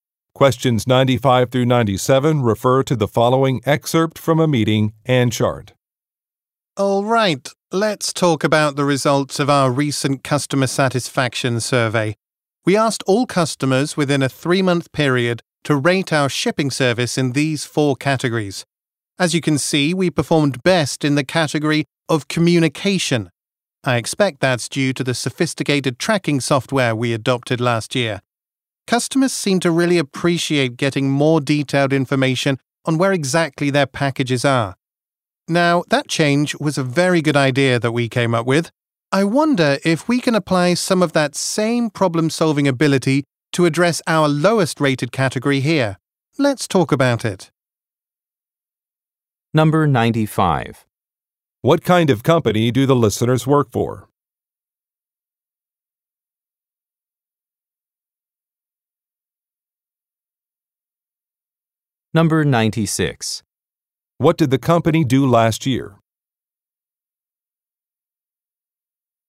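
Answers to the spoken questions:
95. A shipping company
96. It adopted sophisticated package tracking software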